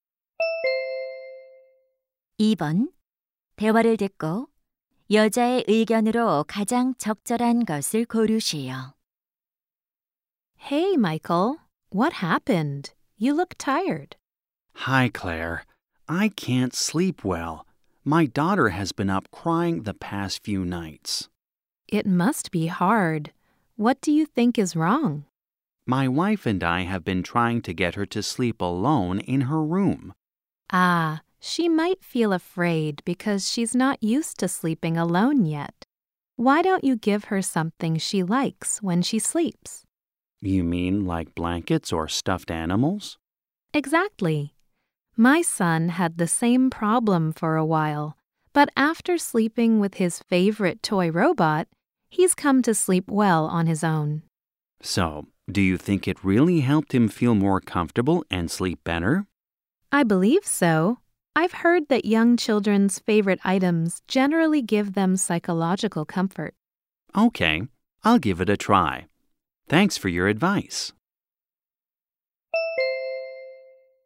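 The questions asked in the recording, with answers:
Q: 대화를 듣고 여자의 의견으로 가장 적절한 것을 고르시오.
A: 아이가 좋아하는 물건은 아이가 혼자 편안하게 자는 데 도움이 된다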